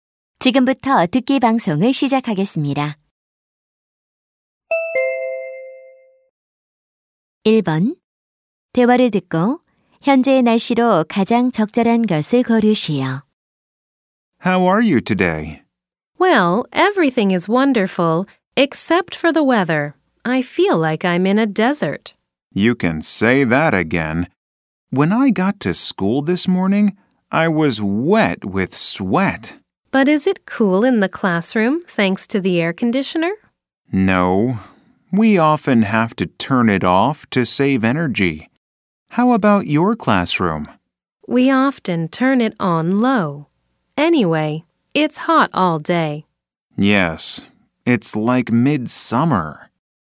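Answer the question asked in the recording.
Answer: 매우 덥다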